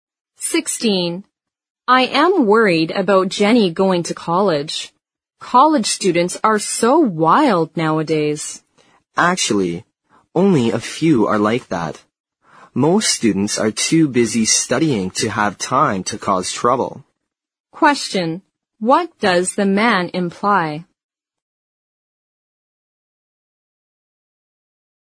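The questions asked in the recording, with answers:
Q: What does the man imply?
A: Most college students are not wild; there's no need to worry about Jenny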